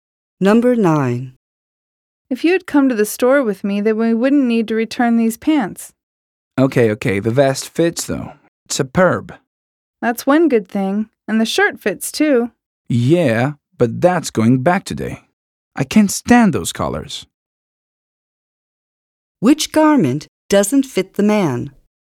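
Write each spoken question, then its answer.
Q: Which garment doesn't fit the man?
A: The pants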